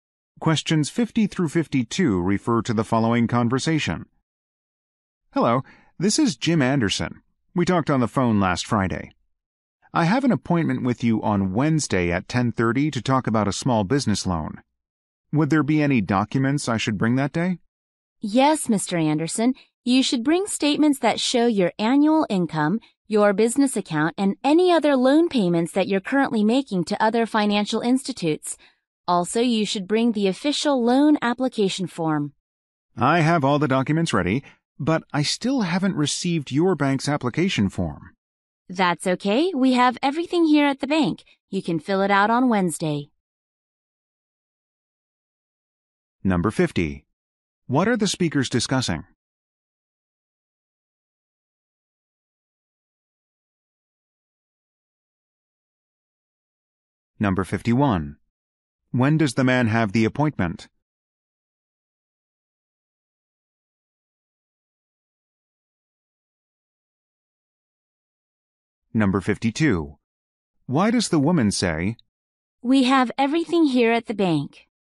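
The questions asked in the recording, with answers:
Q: What are the speakers discussing?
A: Documents needed for a small business loan appointment

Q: When does the man have the appointment?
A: Wednesday at 10:30

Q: Why does the woman say,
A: The man does not need to bring the application form; he can fill it out at the bank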